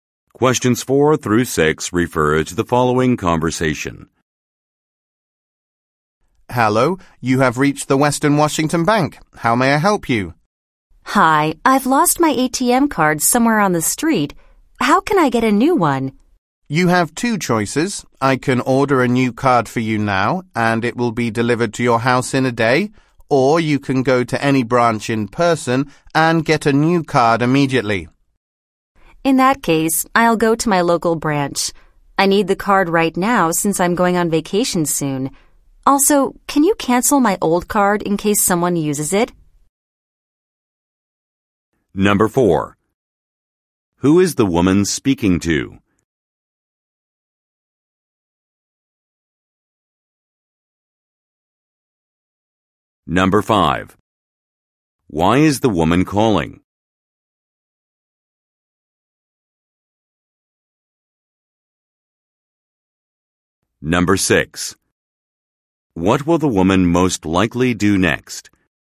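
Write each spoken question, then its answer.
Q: Who is the woman speaking to?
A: A bank employee

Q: Why is the woman calling?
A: She lost her ATM card

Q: What will the woman most likely do next?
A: Go to her local bank branch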